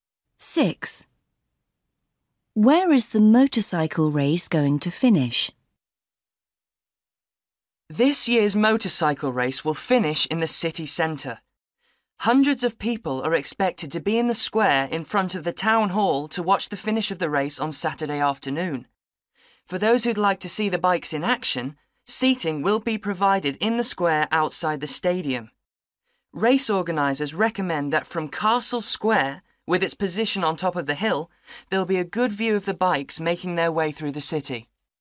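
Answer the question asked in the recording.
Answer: In the square in front of the town hall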